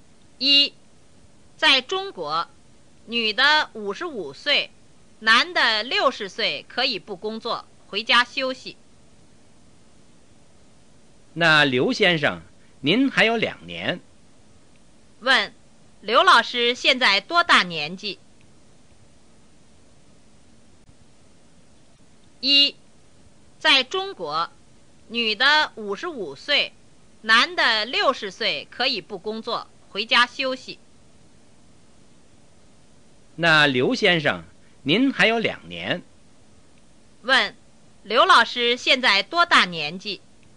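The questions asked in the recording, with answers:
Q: 刘老师现在多大年纪?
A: 58岁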